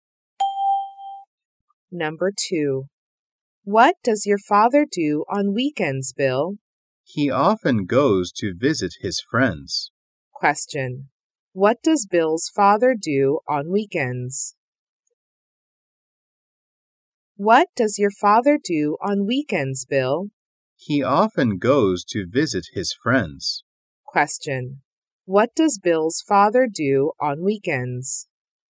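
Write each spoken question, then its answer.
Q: What does Bill's father do on weekends?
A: He often visits his friends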